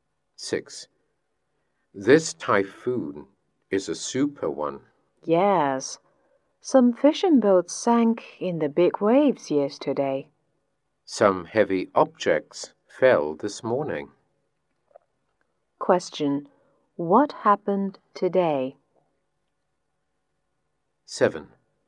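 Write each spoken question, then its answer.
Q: What happened today?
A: Some heavy objects fell.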